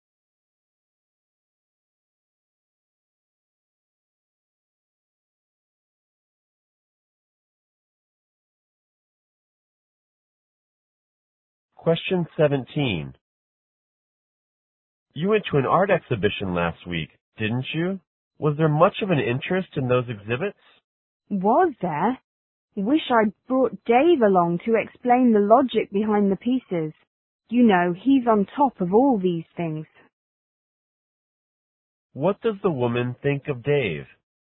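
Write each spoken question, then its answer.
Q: What does the woman think of Dave?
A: He knows a lot about art.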